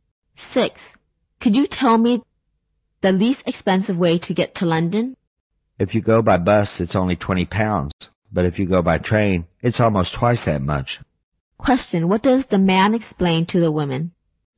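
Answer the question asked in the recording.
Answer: The bus is cheapest (£20); the train costs almost twice as much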